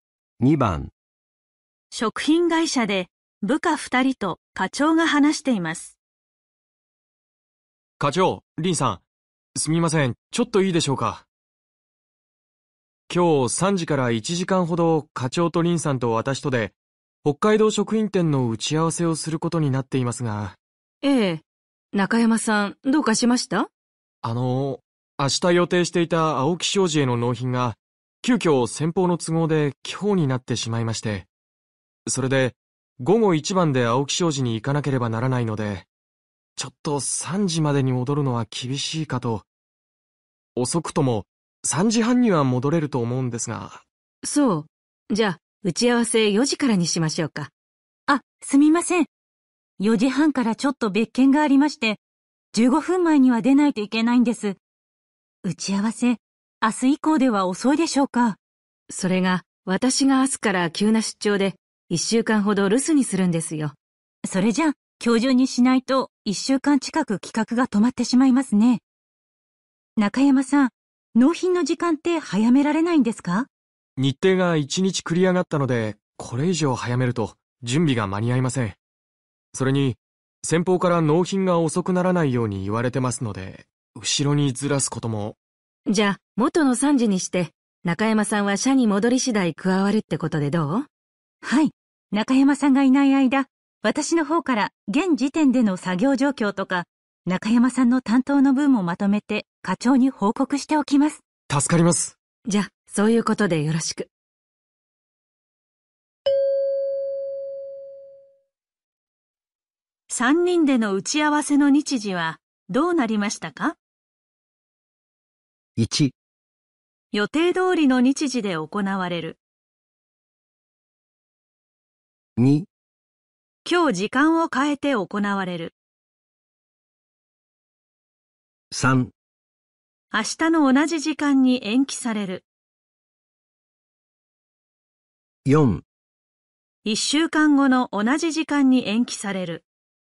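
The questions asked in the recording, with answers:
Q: 3人での打ち合わせの日時はどうなりましたか?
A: 1: 予定通りの日時で行われる。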